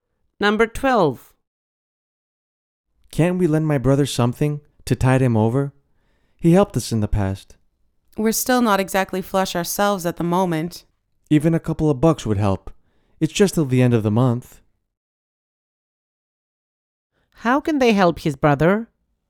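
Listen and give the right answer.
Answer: Lend him a little money until the end of the month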